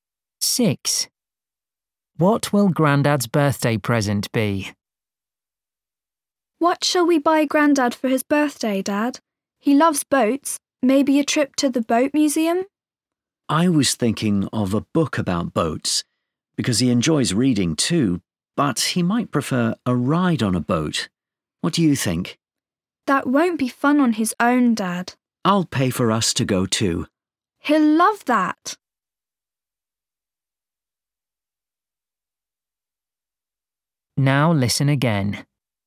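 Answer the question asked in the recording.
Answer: a boat ride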